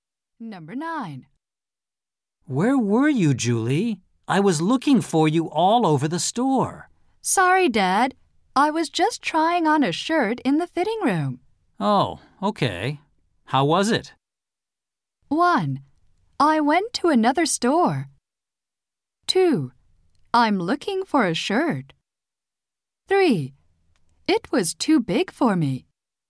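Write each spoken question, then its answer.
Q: Oh, okay. How was it?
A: 3: It was too big for me.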